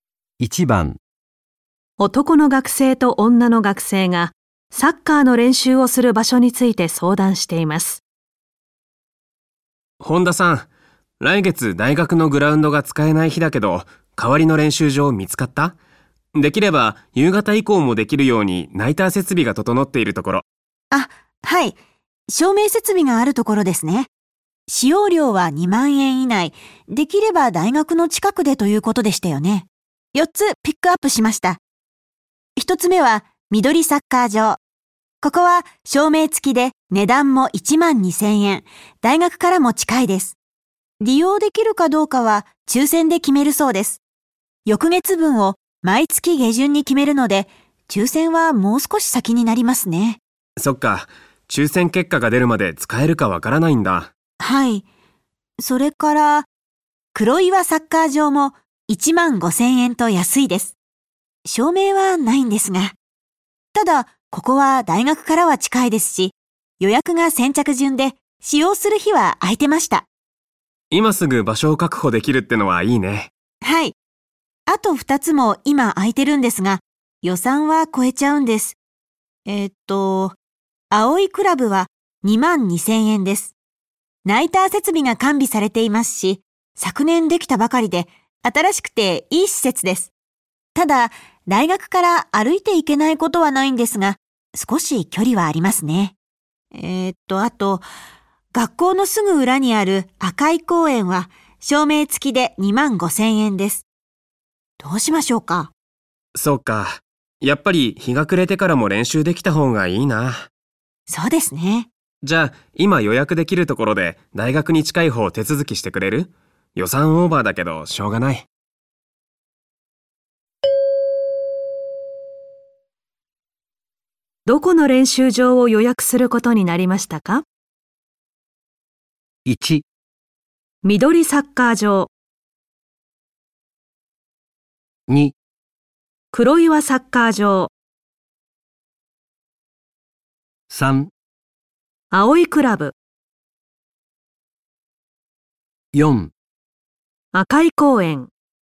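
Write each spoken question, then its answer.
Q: どこの練習場を予約することになりましたか?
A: 4: 赤い公園。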